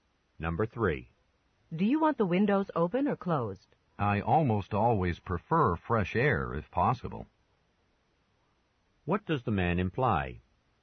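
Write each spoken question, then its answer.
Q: What does the man imply?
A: He wants the windows open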